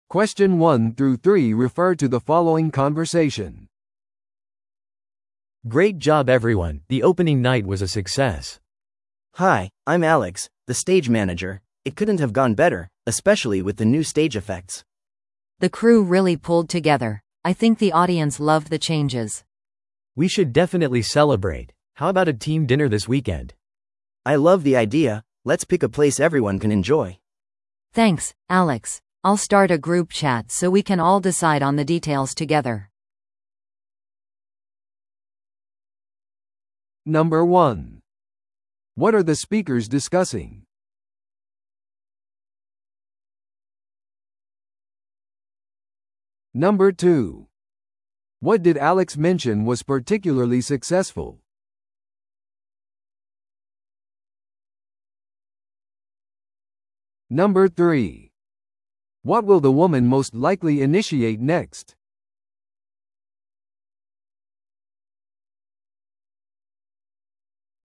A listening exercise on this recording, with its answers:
Listen to the audio below and answer the questions.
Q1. What are the speakers discussing?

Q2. What did Alex mention was particularly successful?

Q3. What will the woman most likely initiate next?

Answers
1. D: The success of the performance.
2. B: The new stage effects.
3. B: A group chat for the dinner plans.

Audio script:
A: Great job everyone, the opening night was a success.
B: Hi, I'm Alex, the stage manager. It couldn't have gone better, especially with the new stage effects.
C: The crew really pulled together. I think the audience loved the changes.
A: We should definitely celebrate. How about a team dinner this weekend?
B: I love the idea! Let's pick a place everyone can enjoy.
C: Thanks, Alex. I'll start a group chat so we can all decide on the details together.